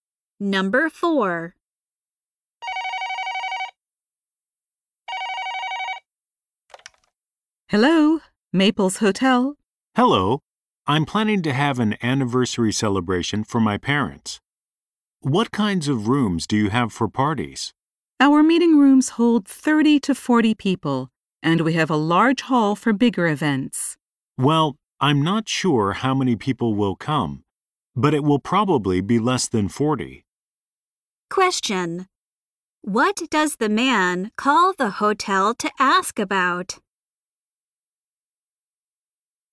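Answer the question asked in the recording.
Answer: Rooms for an anniversary party for his parents.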